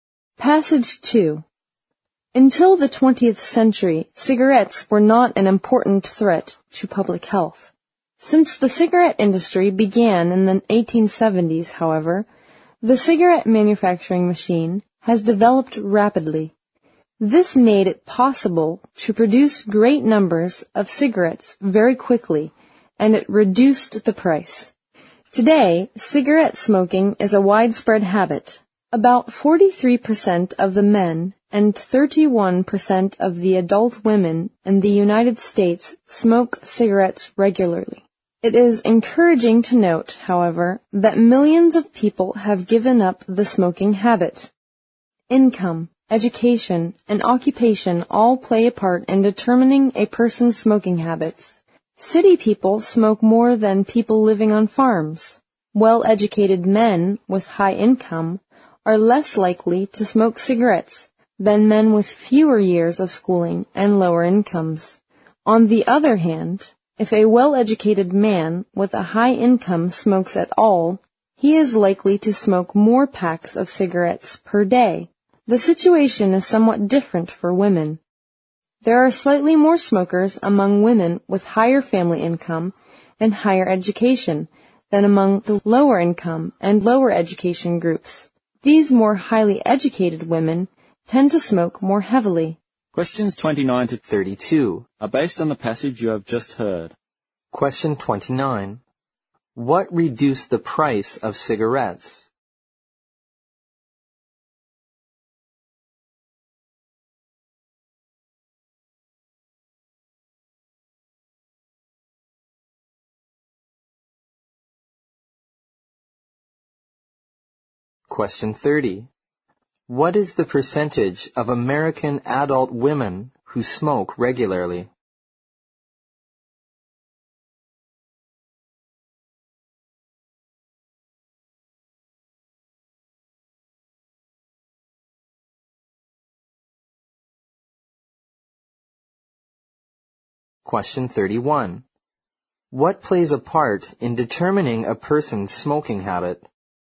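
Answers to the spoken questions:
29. The cigarette manufacturing machine
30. 31%
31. Income, education and occupation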